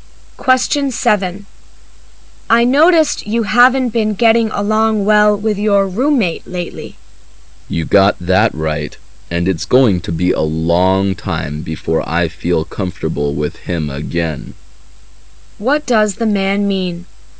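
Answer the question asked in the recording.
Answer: He still doesn't get along with his roommate and won't feel comfortable with him for a long time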